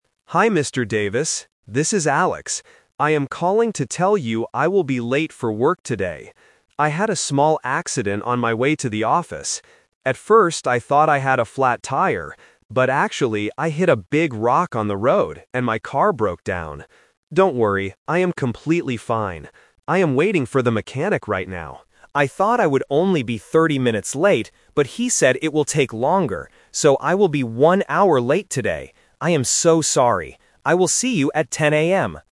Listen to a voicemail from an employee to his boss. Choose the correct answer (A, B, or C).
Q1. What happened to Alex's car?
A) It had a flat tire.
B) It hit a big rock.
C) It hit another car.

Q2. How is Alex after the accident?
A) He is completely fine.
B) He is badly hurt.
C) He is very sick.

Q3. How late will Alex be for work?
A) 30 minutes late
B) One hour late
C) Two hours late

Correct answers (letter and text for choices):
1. B) It hit a big rock.
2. A) He is completely fine.
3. B) One hour late

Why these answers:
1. Alex states the real reason: "...actually, I hit a big rock on the road and my car broke down." Trap (The Twist): Option A (It had a flat tire) is the trap. Alex says he thought he had a flat tire at first, but that was wrong. Option C is a common accident but is not mentioned.
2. Alex reassures his boss: "Don't worry, I am completely fine." Trap: Options B and C are distractors. Bosses usually worry if their employee is hurt, but Alex confirms he is okay.
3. Alex confirms his final delay time: "So, I will be one hour late today." Trap (The Twist): Option A (30 minutes late) is the trap. Alex thought he would only be 30 minutes late, but the mechanic said it would take longer.

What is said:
Alex: Hi Mr. Davis. This is Alex. I am calling to tell you I will be late for work today. I had a small accident on my way to the office. At first, I thought I had a flat tire. But actually, I hit a big rock on the road and my car broke down. Don't worry, I am completely fine. I am waiting for the mechanic right now. I thought I would only be thirty minutes late, but he said it will take longer. So, I will be one hour late today. I am so sorry. I will see you at 10 AM.

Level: A2